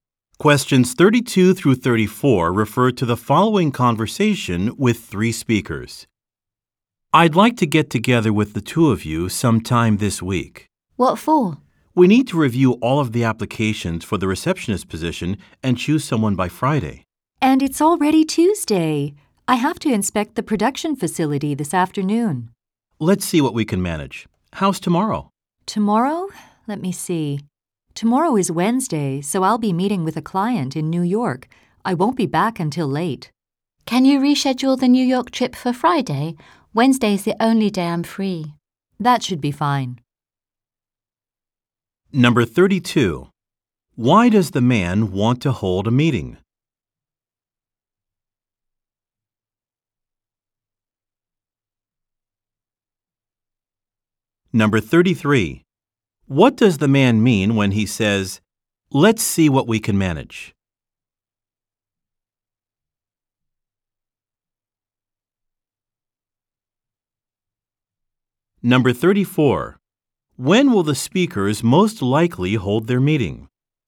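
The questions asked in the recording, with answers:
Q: Why does the man want to hold a meeting?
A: To review applications for the receptionist position and choose someone

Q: When will the speakers most likely hold their meeting?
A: On Wednesday (tomorrow)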